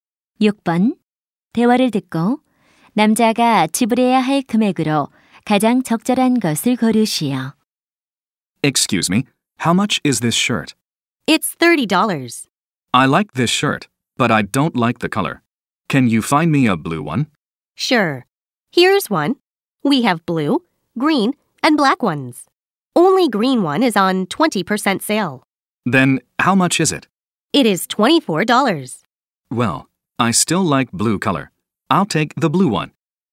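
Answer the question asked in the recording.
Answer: 30달러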